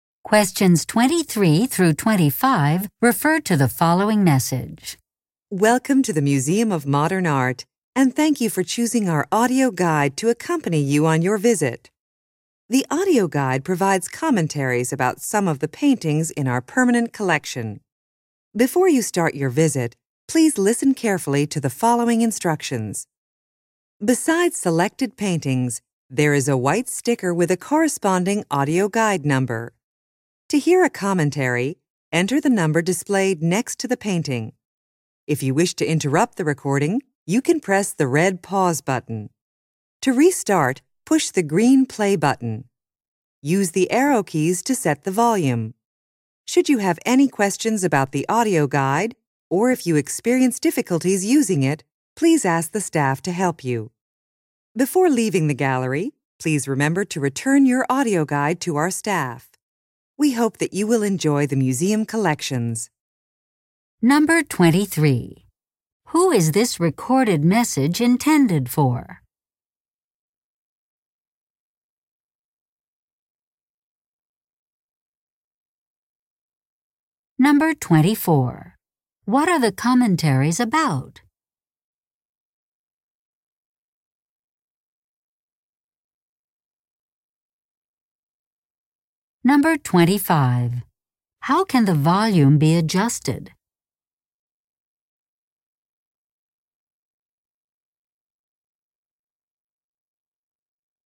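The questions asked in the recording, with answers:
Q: Who is this recorded message intended for?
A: Museum visitors using the audio guide

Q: What are the commentaries about?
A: Some of the paintings in the permanent collection

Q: How can the volume be adjusted?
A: By using the arrow keys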